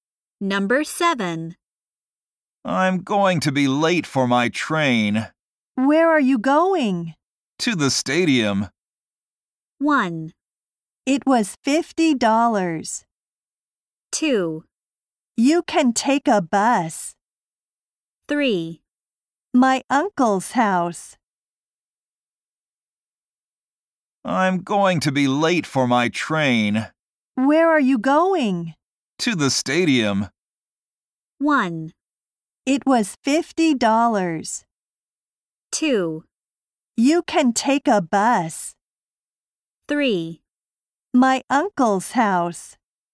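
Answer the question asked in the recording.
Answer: 2: You can take a bus.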